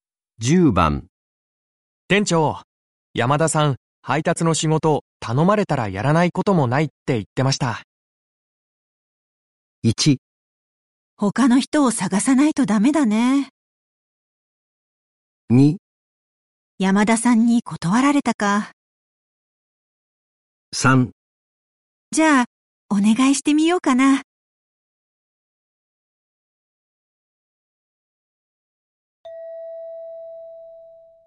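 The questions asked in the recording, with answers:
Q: 店長、山田さん、配達の仕事、頼まれたらやらないこともないって言ってました。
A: 3: じゃあ、お願いしてみようかな。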